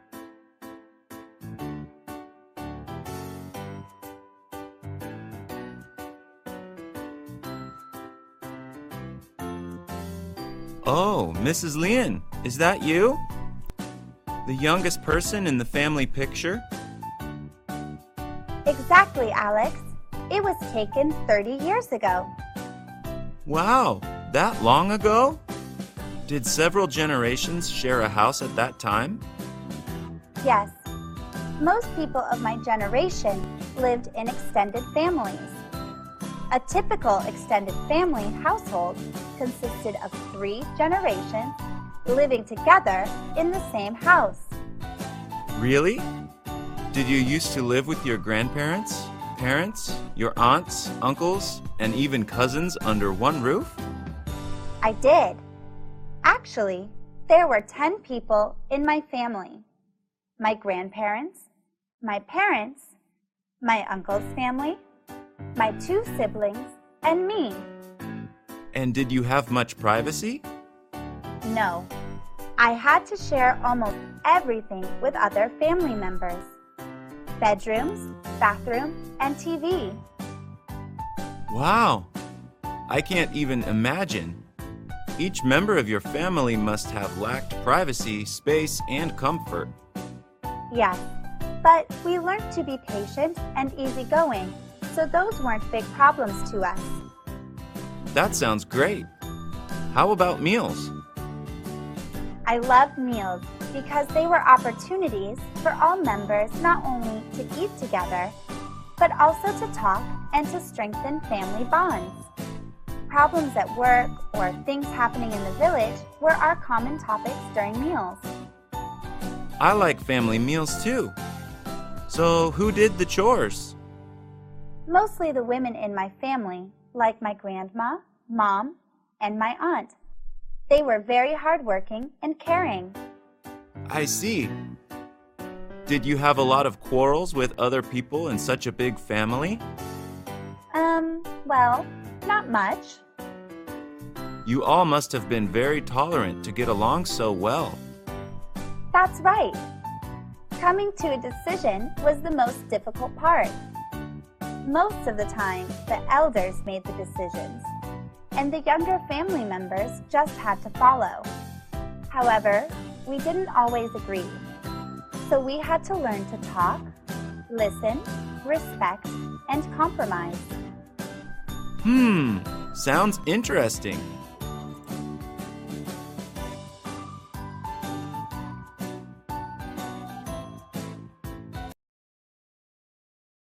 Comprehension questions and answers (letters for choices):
Task: Choose the best answer (A, B, or C)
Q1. How many people were in Mrs. Lien's family?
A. 8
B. 10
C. 12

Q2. What did the family often do during meals?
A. Eat quickly and watch TV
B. Talk and strengthen family bonds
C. Stay quiet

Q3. Who mainly did the chores?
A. The men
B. The grandparents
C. The women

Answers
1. B
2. B
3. C

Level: lớp 9